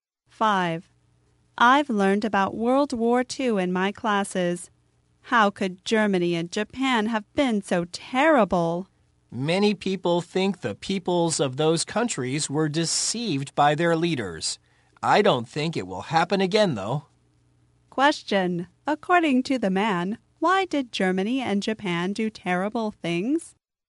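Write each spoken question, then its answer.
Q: according to the man, why did Germany and Japan do terrible things?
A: Their peoples were deceived by their leaders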